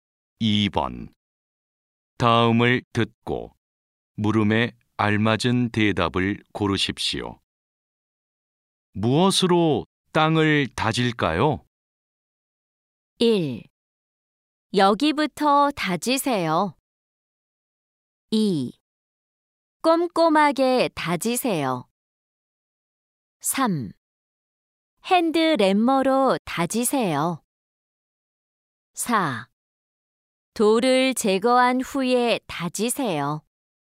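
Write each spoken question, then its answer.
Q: 무엇으로 땅을 다질까요?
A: 3: 핸드램머로 다지세요.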